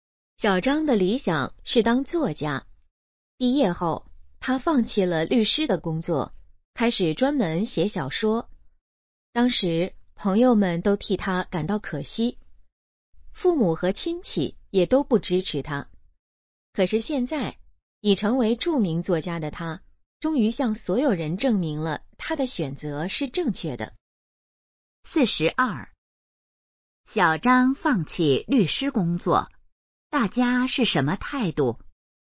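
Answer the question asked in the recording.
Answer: 觉得可惜,不支持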